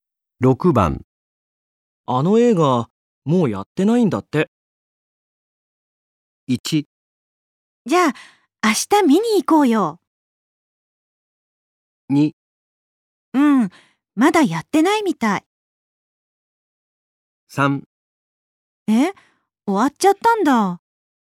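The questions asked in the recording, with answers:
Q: あの映画もうやってないんだって。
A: 3: え、終わっちゃったんだ。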